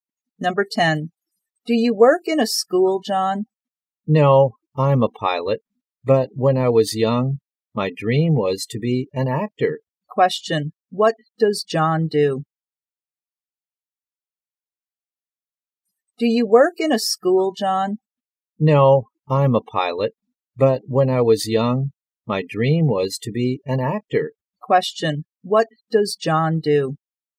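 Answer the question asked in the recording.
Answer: He is a pilot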